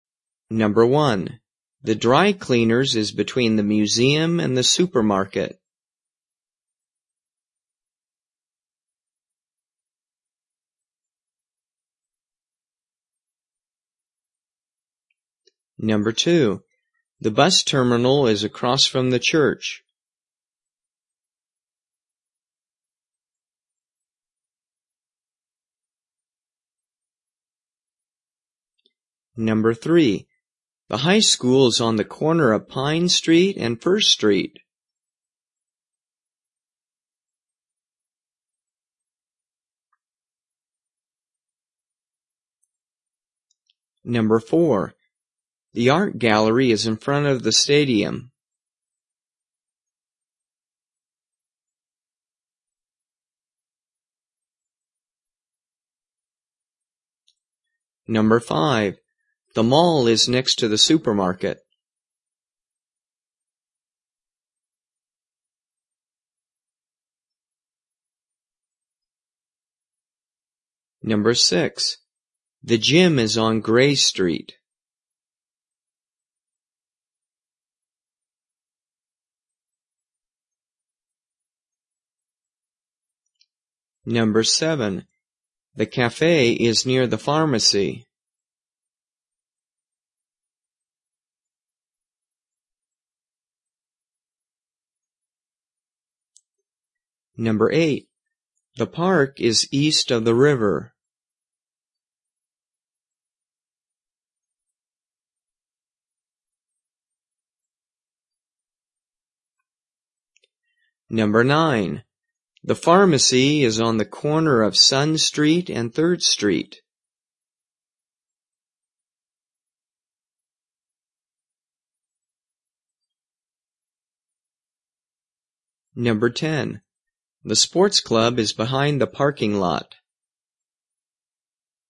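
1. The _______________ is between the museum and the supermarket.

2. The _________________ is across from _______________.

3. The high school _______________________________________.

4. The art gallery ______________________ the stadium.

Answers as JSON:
{"1": "dry cleaners", "2": "bus terminal; the church", "3": "is on the corner of Pine Street and 1st Street", "4": "is in front of"}

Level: 初级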